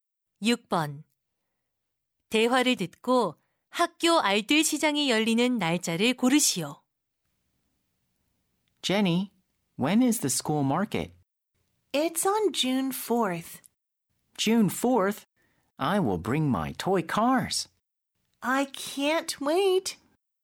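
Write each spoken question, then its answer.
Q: 대화를 듣고 학교 알뜰 시장이 열리는 날짜를 고르시오.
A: 6월 4일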